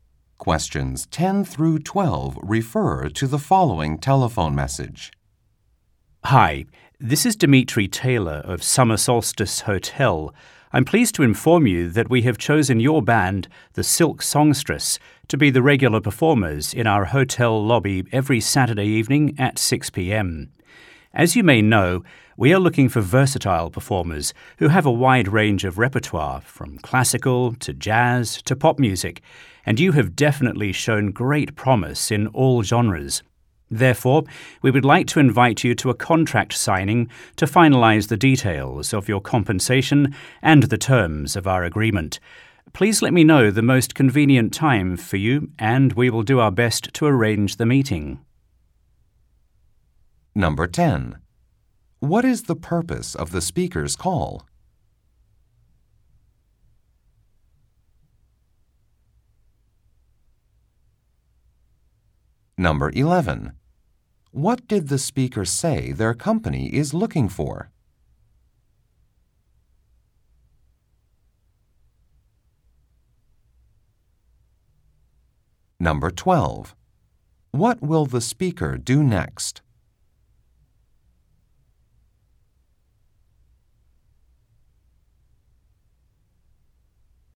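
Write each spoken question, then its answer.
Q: What is the purpose of the speaker's call?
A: To tell the band they were chosen as regular performers and invite them to a contract signing

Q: What did the speaker say their company is looking for?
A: Versatile performers with a wide range of repertoire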